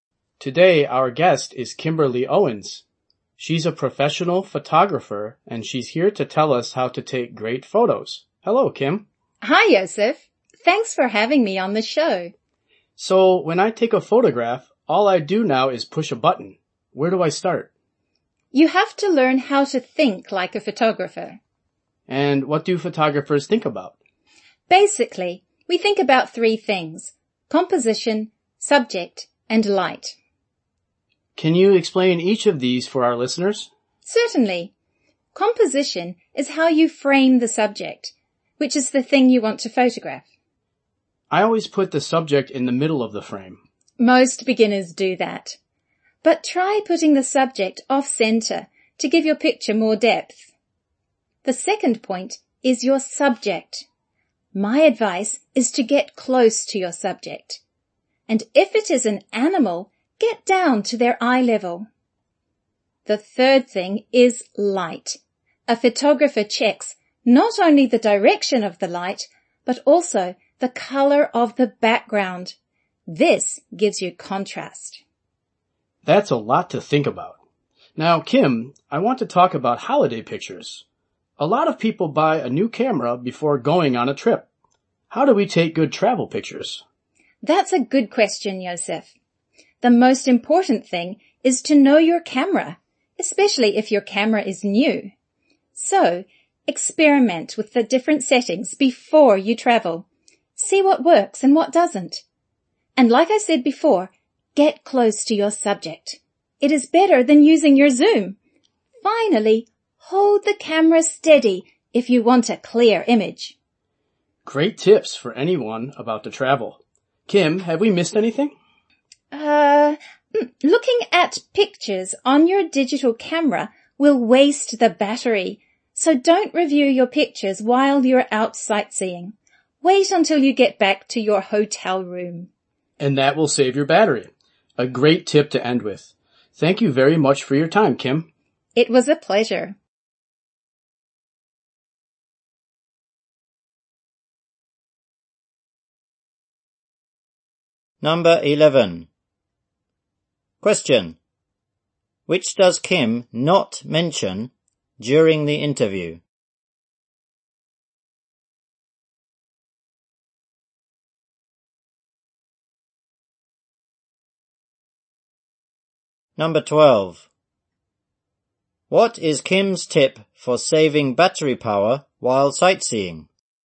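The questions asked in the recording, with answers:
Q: What is Kim's tip for saving battery power while sightseeing?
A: Don't review your pictures until you get back to the hotel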